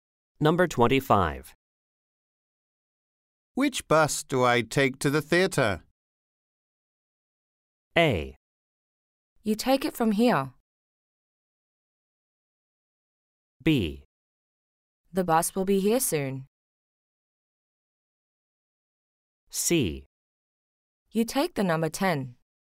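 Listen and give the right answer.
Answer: C: You take the number 10.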